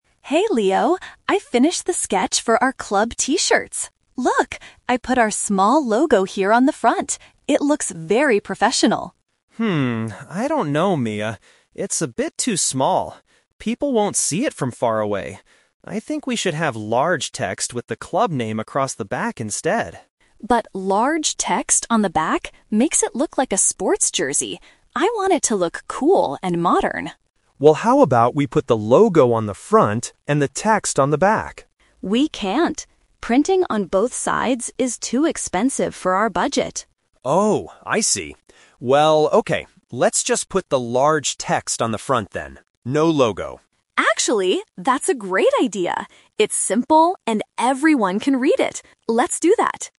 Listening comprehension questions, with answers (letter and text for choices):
Listen to the conversation between two students and choose the correct answer (A, B, or C).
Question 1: What was Mia's original design for the T-shirt?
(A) A large logo on the back.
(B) A small logo on the front.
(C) Large text on the front.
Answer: (B) A small logo on the front.

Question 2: Why does Mia say they cannot print on both the front and the back?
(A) Because it will take too much time.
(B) Because the design will look ugly.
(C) Because it costs too much money.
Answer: (C) Because it costs too much money.

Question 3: What is the final design they agree on?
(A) Large text on the front.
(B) A small logo on the front.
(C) A large logo on the back.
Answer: (A) Large text on the front.

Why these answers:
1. At the beginning, Mia says, "I put our small logo here on the front." Option (A) and (C) are suggestions made later in the conversation.
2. Mia explains that "Printing on both sides is too expensive for our budget." "Too expensive" means it costs too much money. Options (A) and (B) are not mentioned as reasons.
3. This is "The Twist." They debated between a front logo and back text, then considered both. Finally, Leo suggests "large text on the front" and Mia agrees, saying "Let's do that." Option (B) was Mia's first idea (rejected) and Option (C) was Leo's first idea (rejected).

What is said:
Mia: Hey Leo, I finished the sketch for our club T-shirts. Look! I put our small logo here on the front. It looks very professional.
Leo: Hmm, I don't know, Mia. It's a bit too small. People won't see it from far away. I think we should have large text with the club name across the back instead.
Mia: But large text on the back makes it look like a sports jersey. I want it to look cool and modern.
Leo: Well, how about we put the logo on the front and the text on the back?
Mia: We can't. Printing on both sides is too expensive for our budget.
Leo: Oh, I see. Well, okay... let's just put the large text on the front then. No logo.
Mia: Actually, that's a great idea! It's simple and everyone can read it. Let's do that.